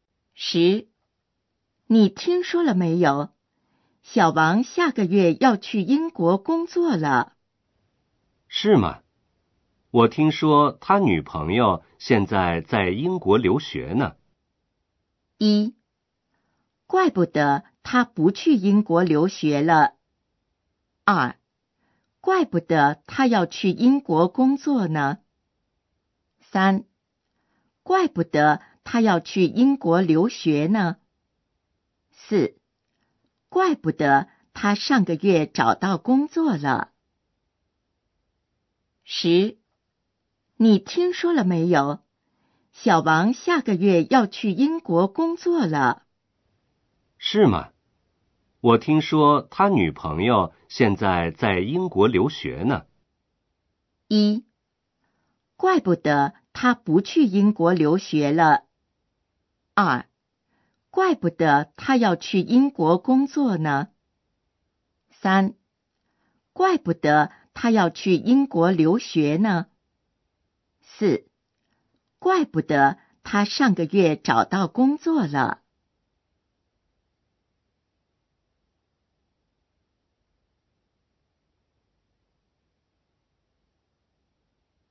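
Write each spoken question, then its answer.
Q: 是吗?我听说他女朋友现在在英国留学呢。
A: 二: 怪不得他要去英国工作呢。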